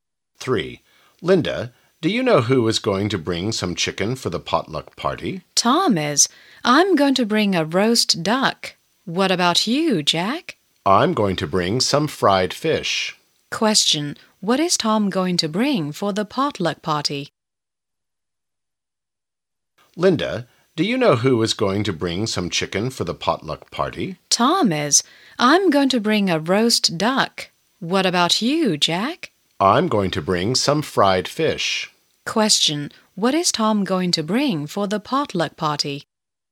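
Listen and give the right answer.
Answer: Some chicken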